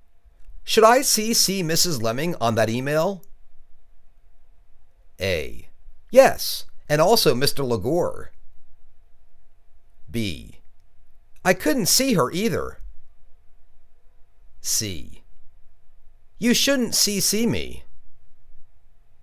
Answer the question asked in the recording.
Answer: Yes, and also Mr. LeGore.